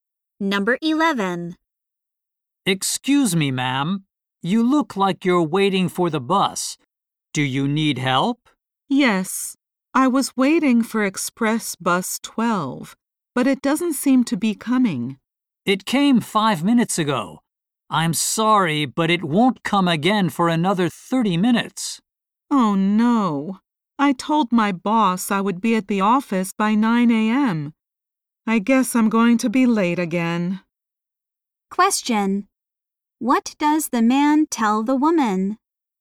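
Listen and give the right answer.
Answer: The bus left 5 minutes ago, and the next one won't come for 30 minutes.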